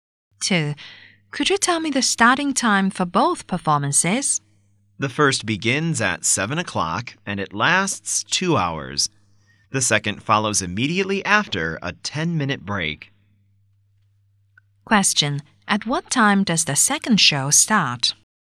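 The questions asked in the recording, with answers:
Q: At what time does the second show start?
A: At 9:10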